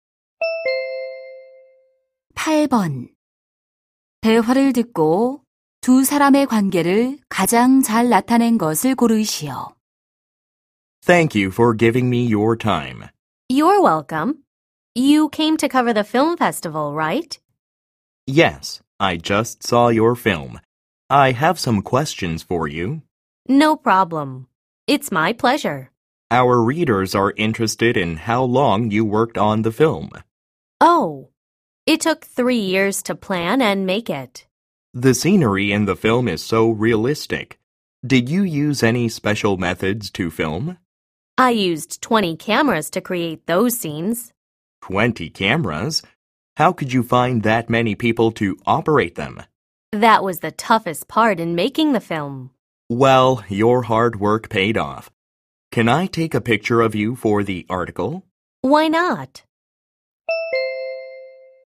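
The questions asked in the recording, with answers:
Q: 대화를 듣고 두 사람의 관계를 가장 잘 나타낸 것을 고르시오.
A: 기자 - 영화감독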